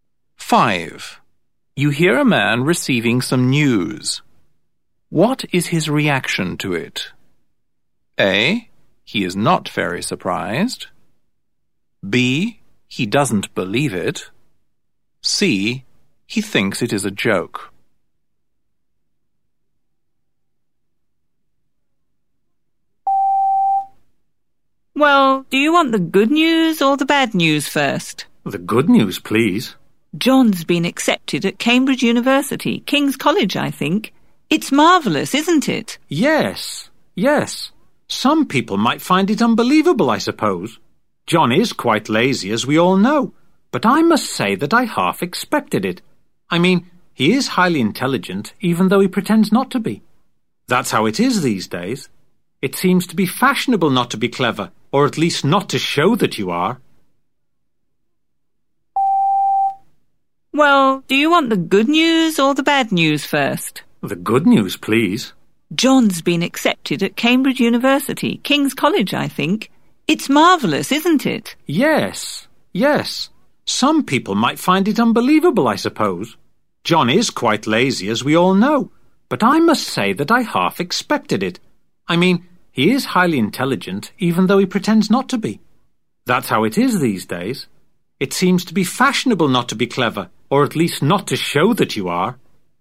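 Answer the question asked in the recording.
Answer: A: He is not very surprised.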